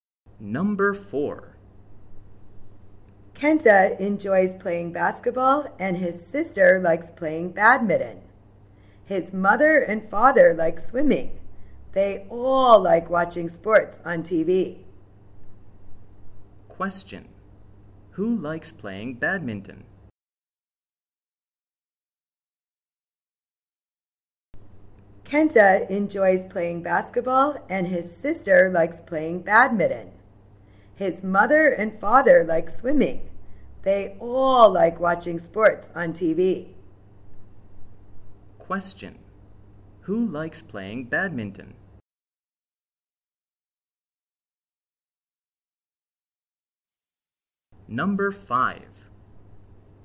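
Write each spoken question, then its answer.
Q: Who likes playing badminton?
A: Kenta's sister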